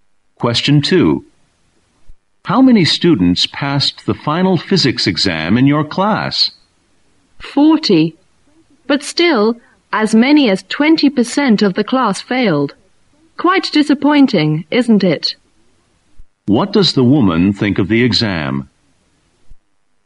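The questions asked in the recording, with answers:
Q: What does the woman think of the exam?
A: The results were disappointing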